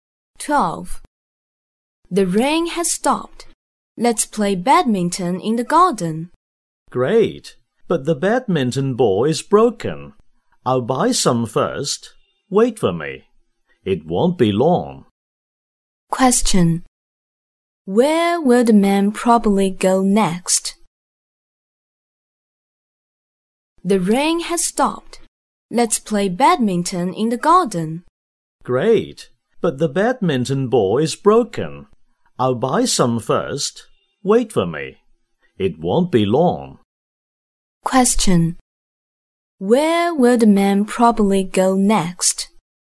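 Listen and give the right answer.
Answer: To a shop to buy shuttlecocks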